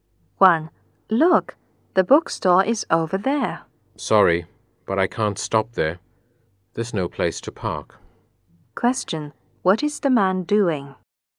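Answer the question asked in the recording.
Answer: Driving a car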